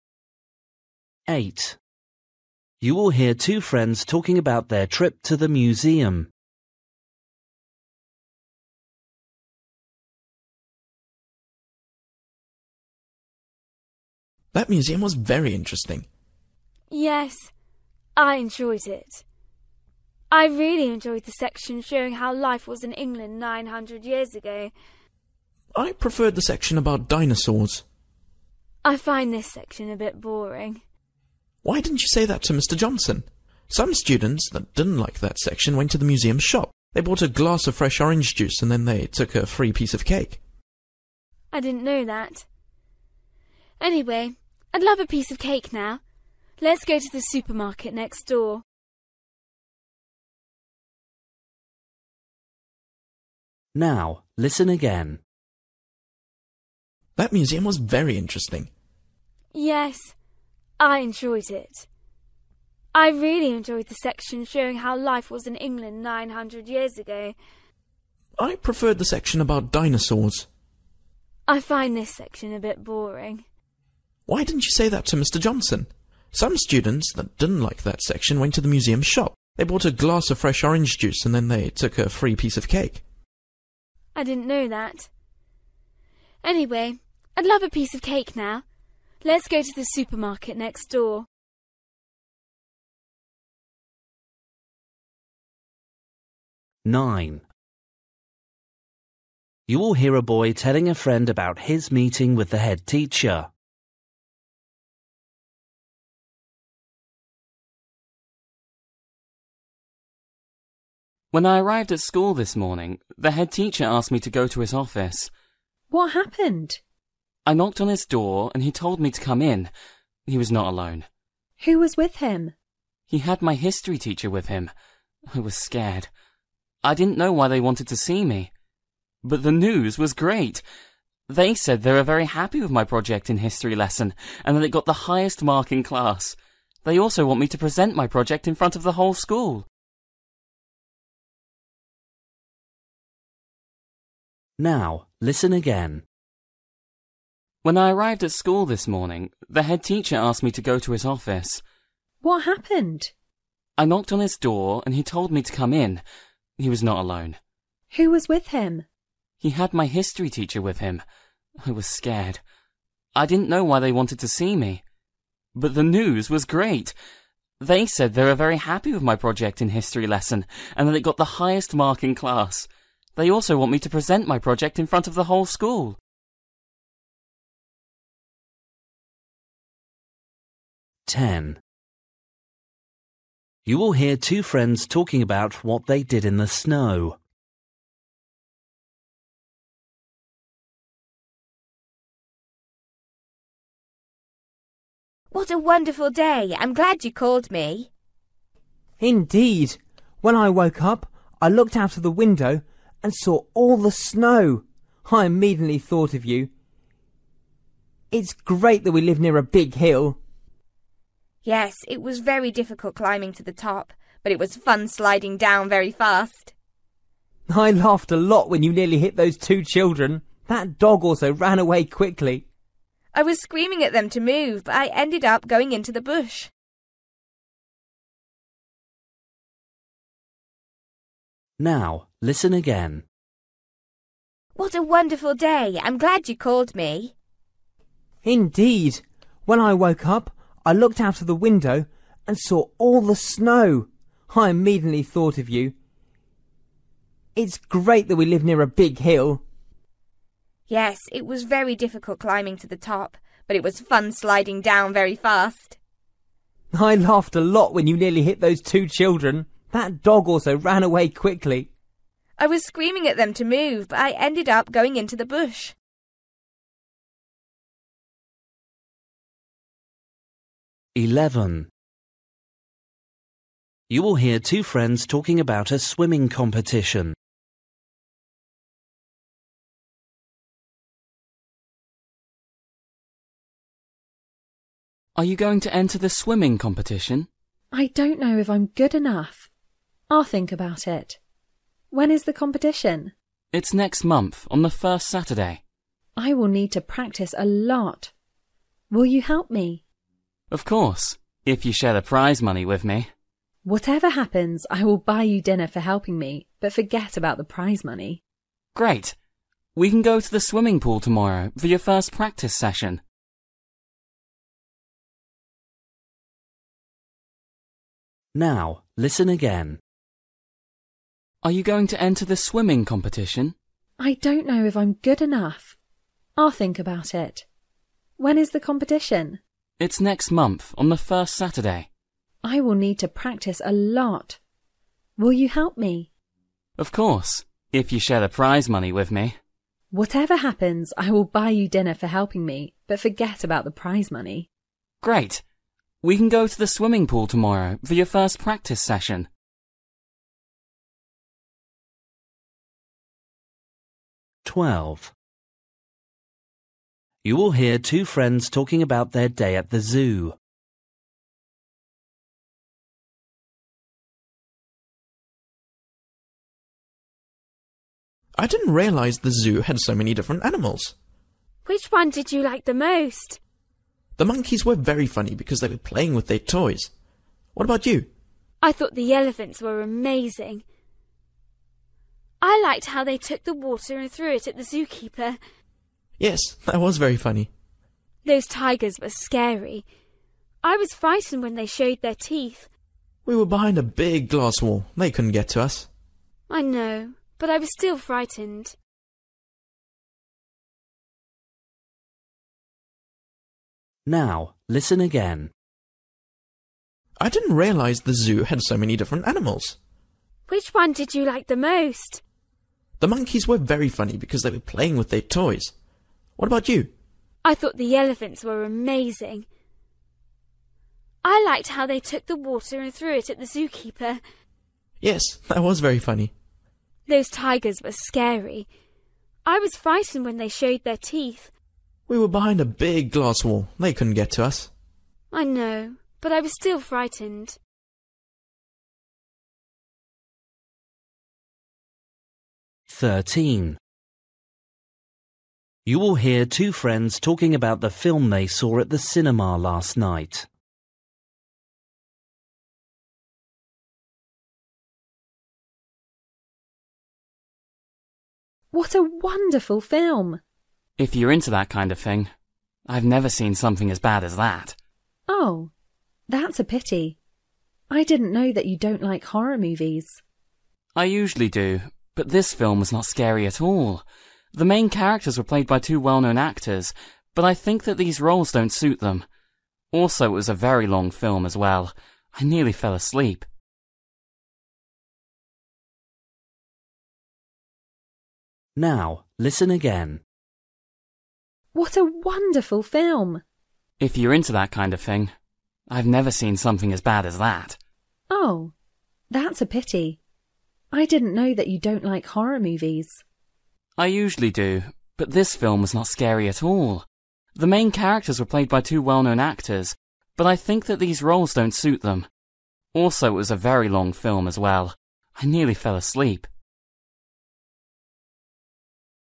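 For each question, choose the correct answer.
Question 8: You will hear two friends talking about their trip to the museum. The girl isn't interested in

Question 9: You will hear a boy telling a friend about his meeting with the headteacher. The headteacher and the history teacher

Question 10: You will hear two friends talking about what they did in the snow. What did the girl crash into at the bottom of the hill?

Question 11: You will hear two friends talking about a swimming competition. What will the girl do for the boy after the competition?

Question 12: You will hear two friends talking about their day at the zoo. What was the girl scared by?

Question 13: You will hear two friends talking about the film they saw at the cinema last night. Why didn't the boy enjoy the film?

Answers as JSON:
{"8": "the dinosaur section", "9": "were very happy with his history project", "10": "a bush", "11": "buy him dinner", "12": "the tigers", "13": "It was not scary at all."}

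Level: Luyện nghe trình độ B1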